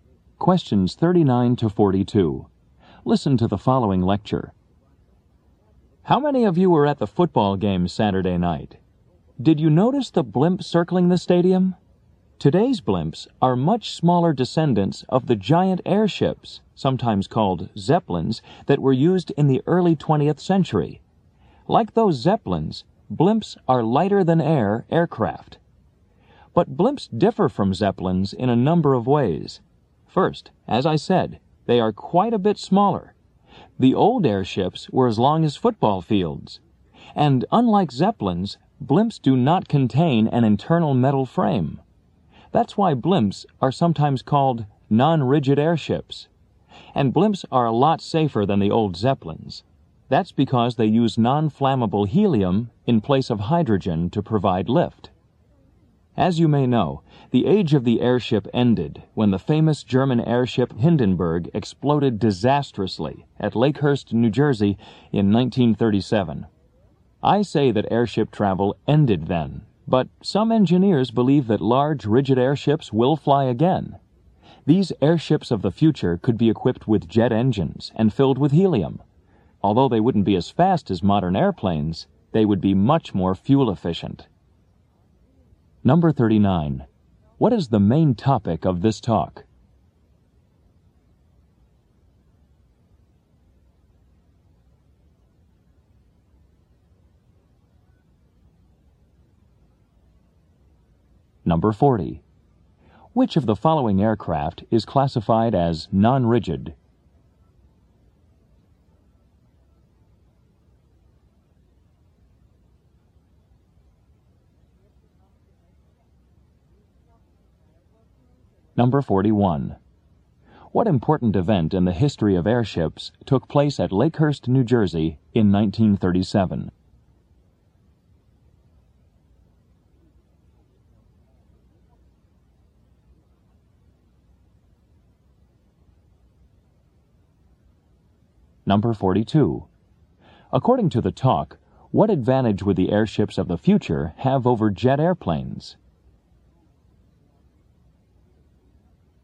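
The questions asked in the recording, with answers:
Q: What is the main topic of this talk?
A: Blimps and airships

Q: Which of the following aircraft is classified as non-rigid?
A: A blimp

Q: What important event in the history of airships took place at Lakehurst, New Jersey in 1937?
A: The Hindenburg exploded

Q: According to the talk, what advantage would the airships of the future have over jet airplanes?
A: They would be more fuel efficient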